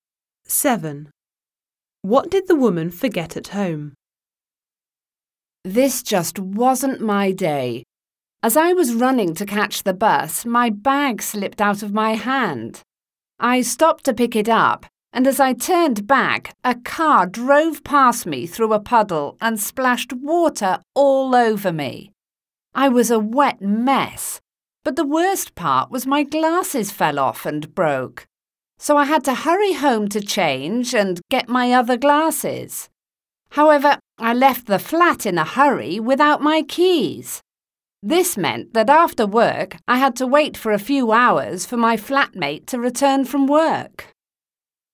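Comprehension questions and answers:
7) What did the woman forget at home?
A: keys

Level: 9-Б клас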